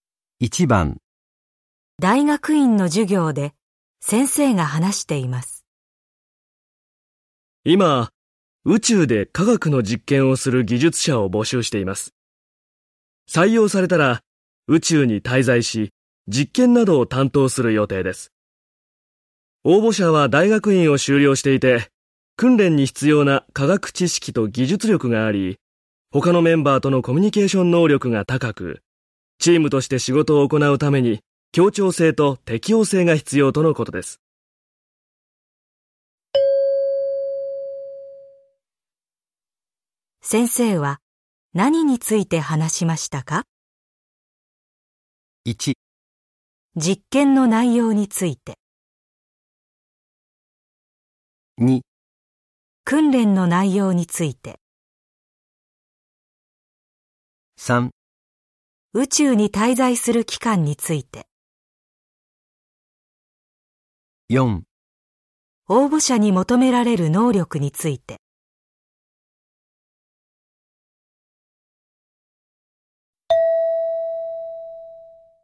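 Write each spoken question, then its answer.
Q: 先生は何について話しましたか?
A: 4: 応募者に求められる能力について。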